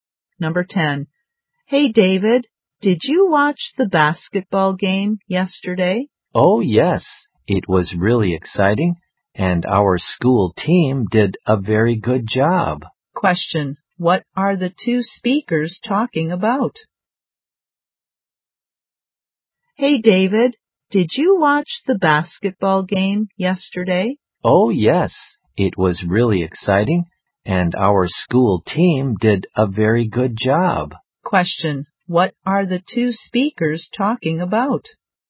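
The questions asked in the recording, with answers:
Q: Question. What are the two speakers talking about?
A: A basketball game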